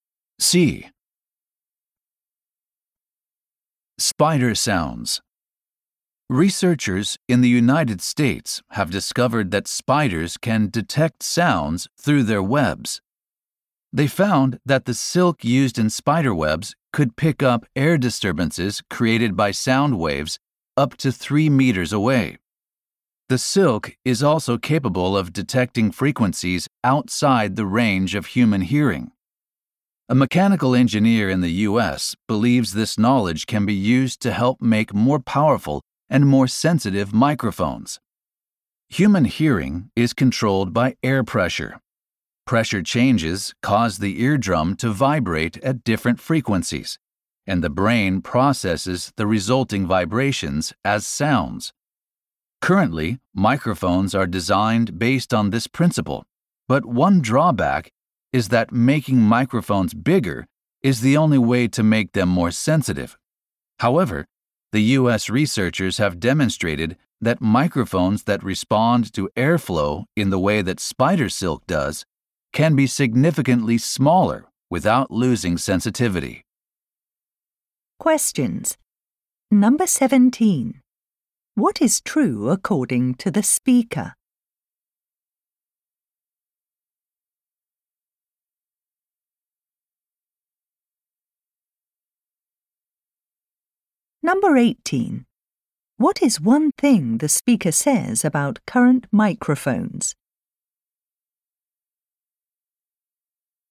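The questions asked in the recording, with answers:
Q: What is one thing the speaker says about current microphones?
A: They can only be made more sensitive by making them bigger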